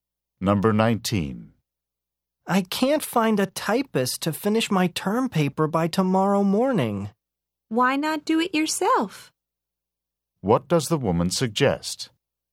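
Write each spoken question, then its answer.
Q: What does the woman suggest?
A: That the man type the paper himself.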